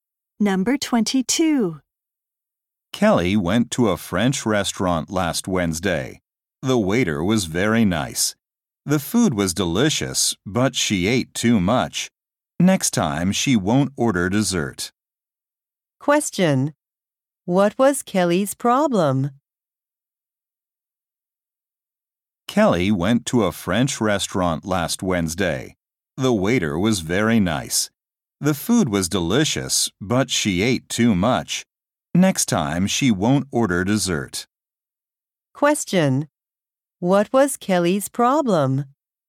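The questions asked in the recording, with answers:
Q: What was Kelly's problem?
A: She ate too much.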